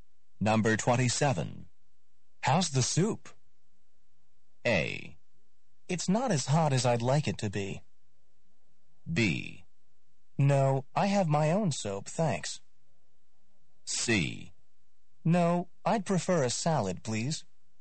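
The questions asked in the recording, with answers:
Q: How's the soup?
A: A: It's not as hot as I'd like it to be.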